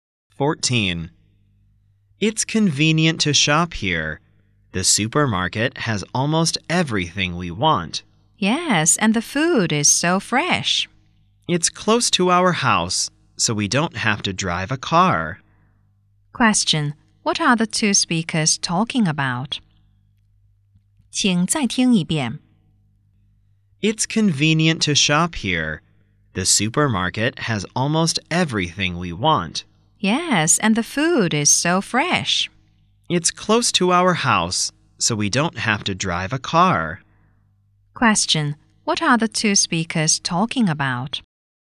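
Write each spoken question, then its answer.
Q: What are the 2 speakers talking about?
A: A supermarket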